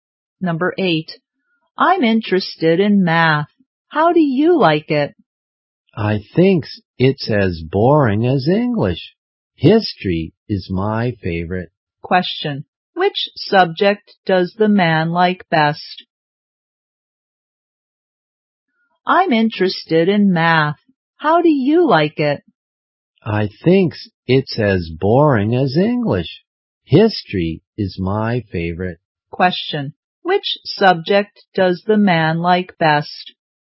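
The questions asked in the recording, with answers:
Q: Question. Which subject does the man like best?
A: History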